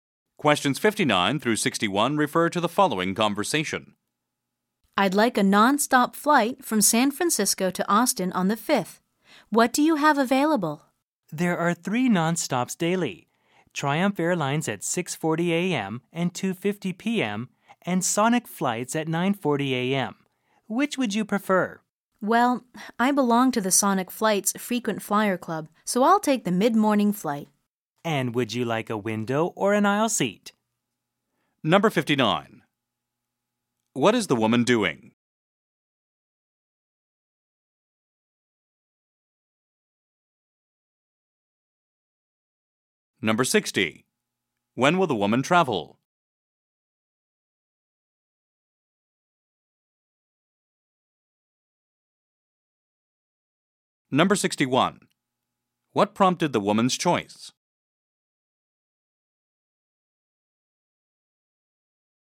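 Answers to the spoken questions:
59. Booking a flight
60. At 9:40 a.m. on the 5th
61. She belongs to the Sonic Flights Frequent Flyer Club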